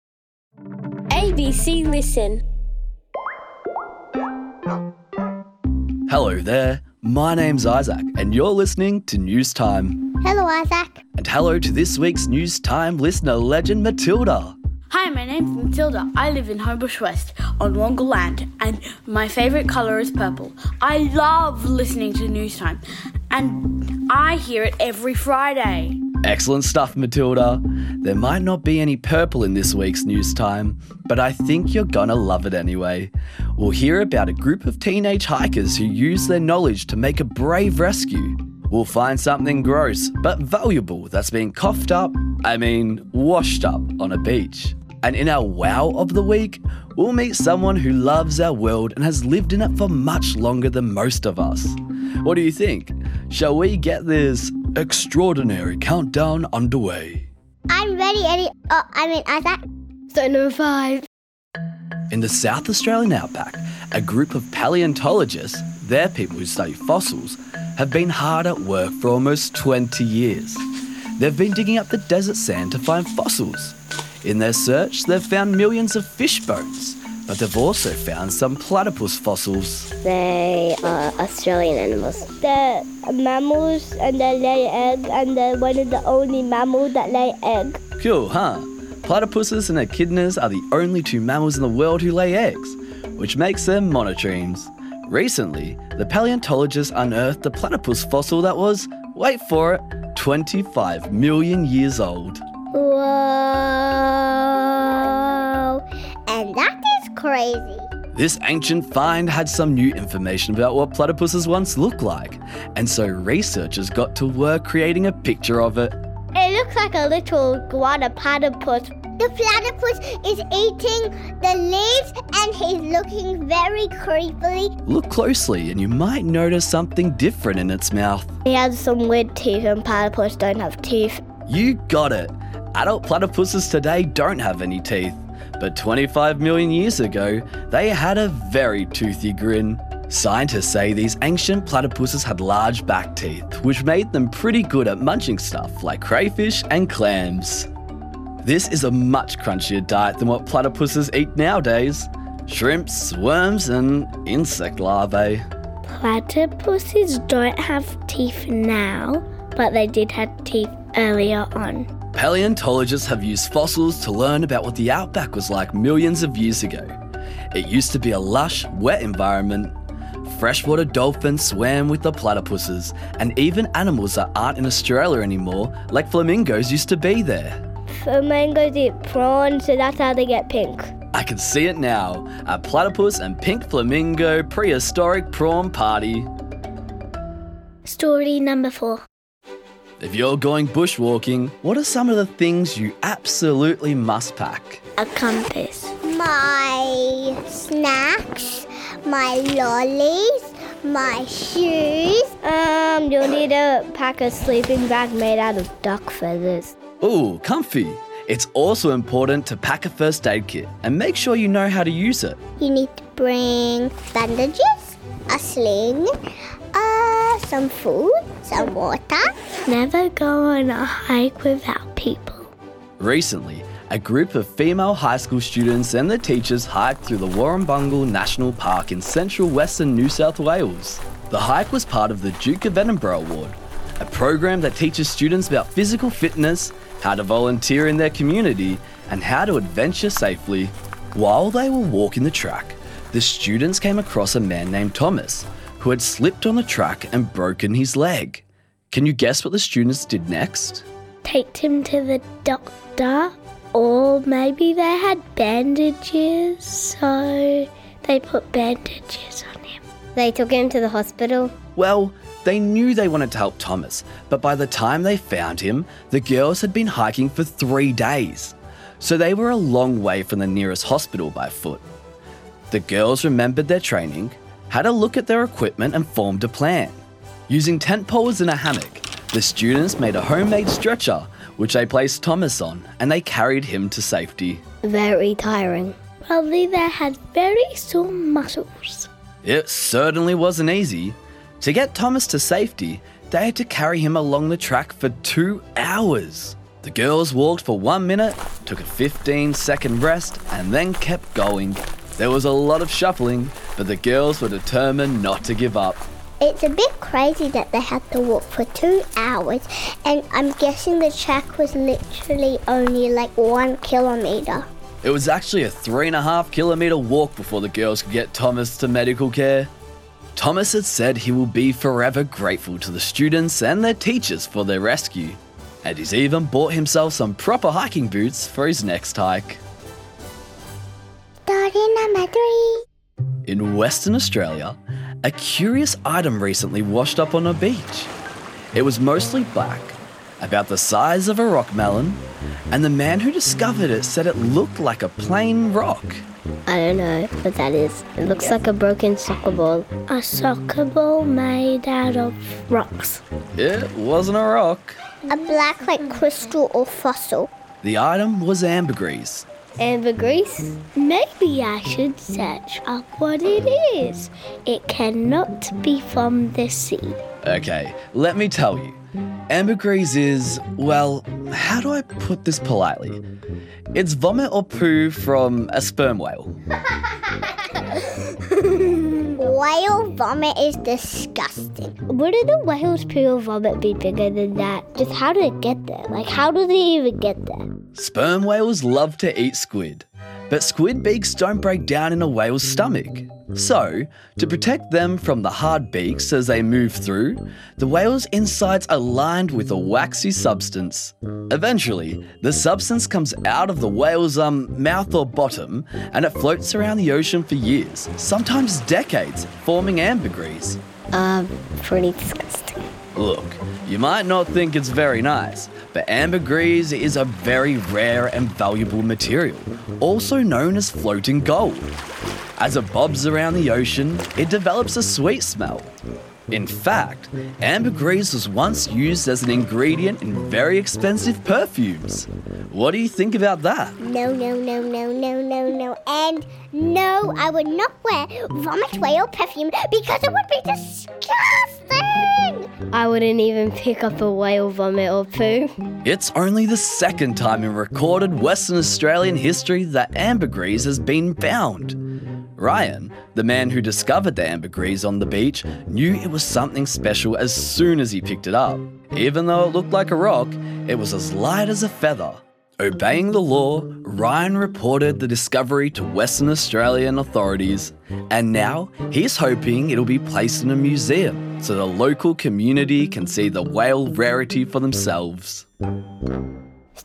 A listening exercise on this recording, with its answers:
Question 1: What has been discovered about platypuses from millions of years ago?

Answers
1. They had teeth!